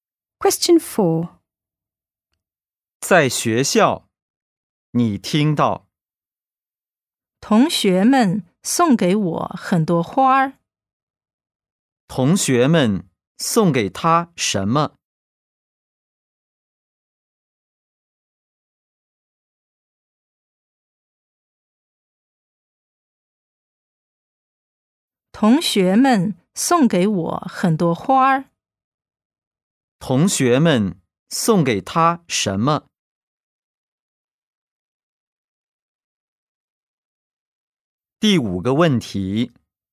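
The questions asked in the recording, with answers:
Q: 同学们送给他什么?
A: 很多花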